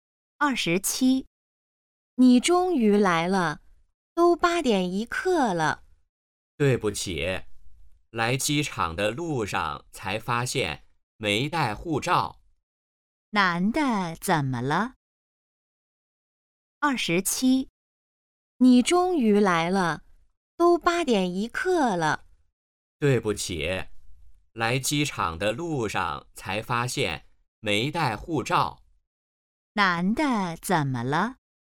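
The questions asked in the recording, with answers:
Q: 男的怎么了?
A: 没带护照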